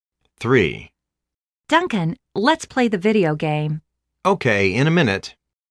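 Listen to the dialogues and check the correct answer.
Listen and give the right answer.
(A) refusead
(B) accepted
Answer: (B) accepted

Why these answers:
A:Duncan,let's play the video game! B:Ok,in a minute.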